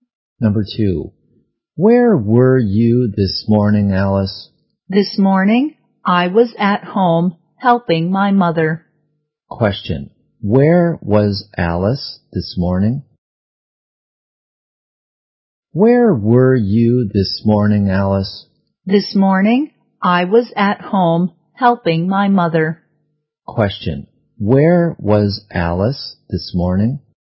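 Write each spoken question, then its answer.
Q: Where was Alice this morning?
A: At home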